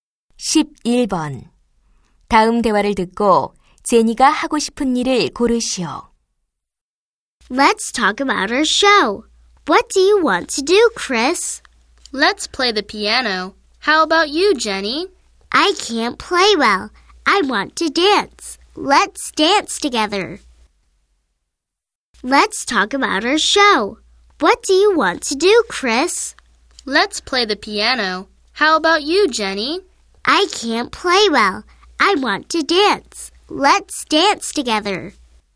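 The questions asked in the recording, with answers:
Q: 다음 대화를 듣고 제니가 하고 싶은 일을 고르시오.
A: 춤추기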